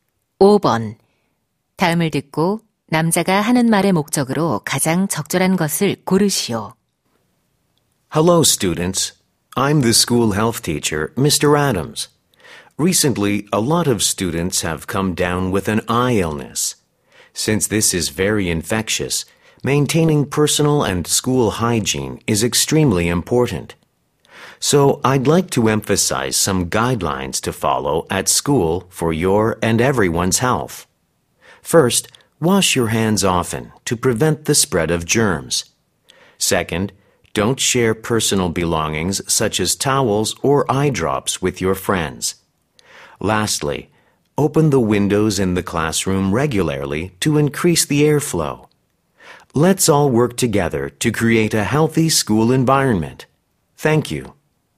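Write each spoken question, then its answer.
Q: 다음을 듣고 남자가 하는 말의 목적으로 가장 적절한 것을 고르시오.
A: 눈병 예방을 위한 학교 위생 수칙 준수를 당부하려고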